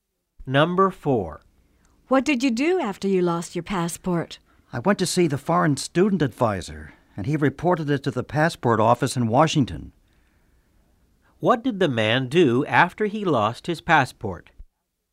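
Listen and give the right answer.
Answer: He went to see the foreign student advisor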